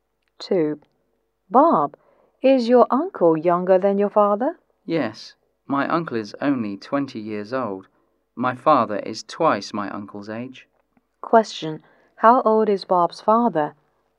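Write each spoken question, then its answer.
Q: How old is Bob's father?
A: 40 years old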